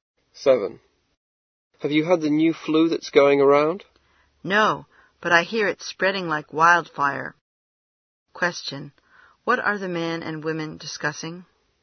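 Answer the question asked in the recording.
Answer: The new flu that is spreading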